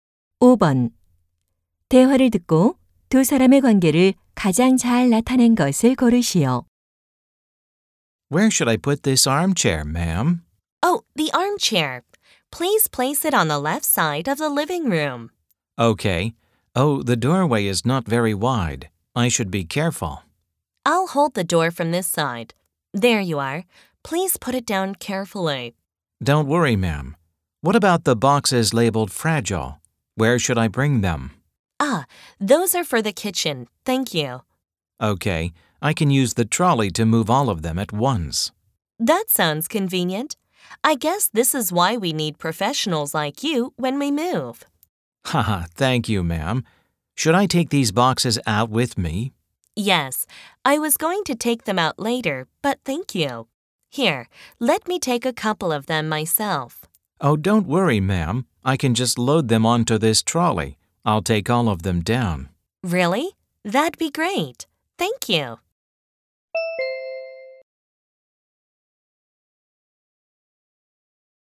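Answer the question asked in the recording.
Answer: 이삿짐 운반업자와 고객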